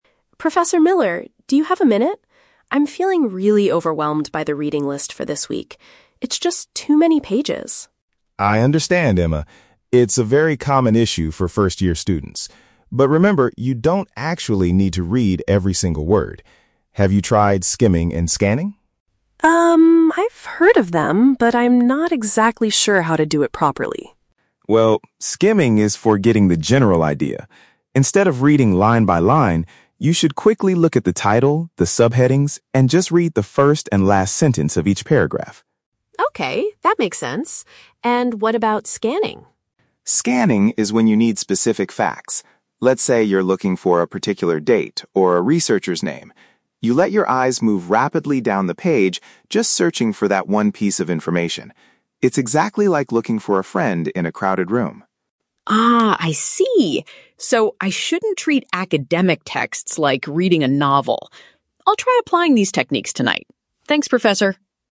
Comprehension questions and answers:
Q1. Why is Emma asking the professor for help?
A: She feels stressed because there is too much material to read.

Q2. According to Professor Miller, what is the main purpose of skimming?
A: To quickly grasp the overall concept of a text.

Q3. How does the professor explain the concept of scanning?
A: It is similar to spotting someone you know in a large group of people.

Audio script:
Emma: Professor Miller, do you have a minute? I'm feeling really overwhelmed by the reading list for this week. It's just too many pages!
Professor Miller: I understand, Emma. It's a very common issue for first-year students. But remember, you don't actually need to read every single word. Have you tried skimming and scanning?
Emma: Um... I've heard of them, but I'm not exactly sure how to do it properly.
Professor Miller: Well, skimming is for getting the general idea. Instead of reading line by line, you should quickly look at the title, the subheadings, and just read the first and last sentence of each paragraph.
Emma: Okay, that makes sense. And what about scanning?
Professor Miller: Scanning is when you need specific facts. Let's say you're looking for a particular date or a researcher's name. You let your eyes move rapidly down the page just searching for that one piece of information. It's exactly like looking for a friend in a crowded room.
Emma: Ah, I see! So I shouldn't treat academic texts like reading a novel. I'll try applying these techniques tonight. Thanks, Professor!